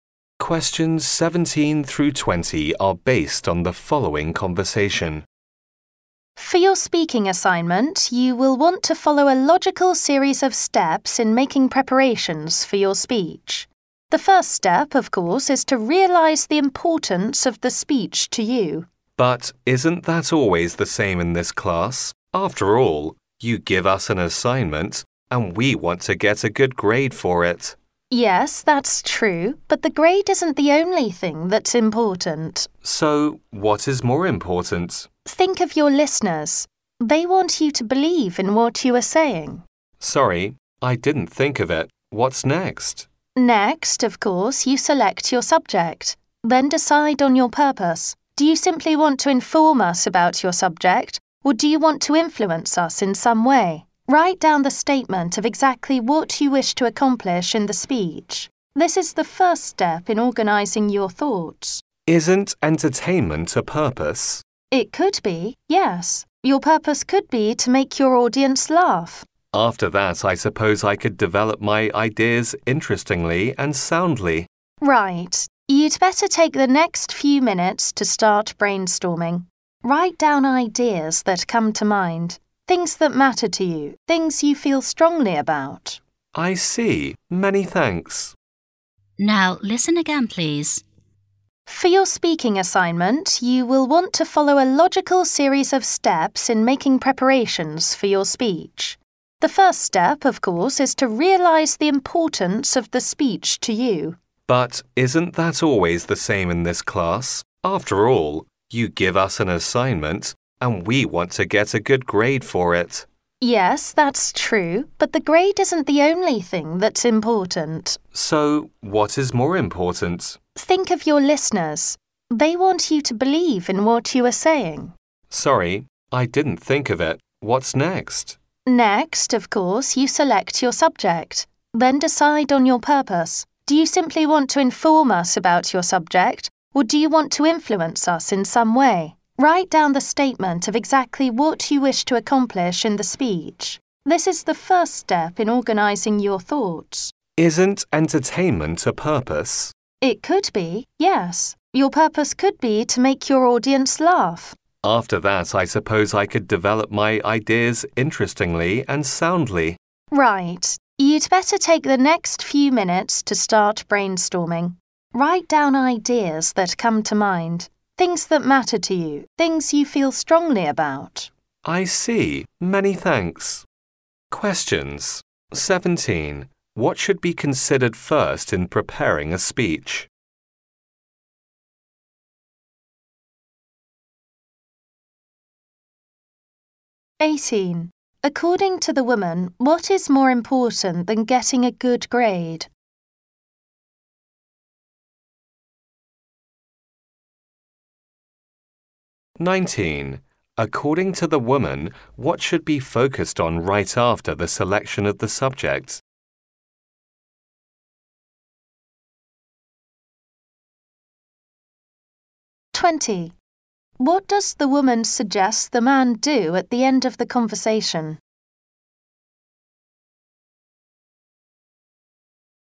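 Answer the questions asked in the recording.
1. The importance of the speech to you
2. The listeners
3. Deciding the purpose
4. Start brainstorming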